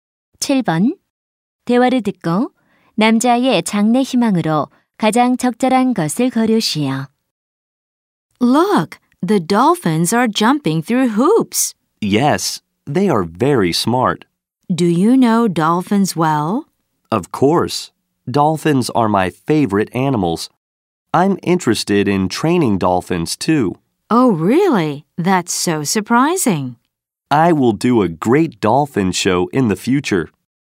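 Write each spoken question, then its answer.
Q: 대화를 듣고 남자의 장래 희망으로 가장 적절한 것을 고르시오.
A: 돌고래 조련사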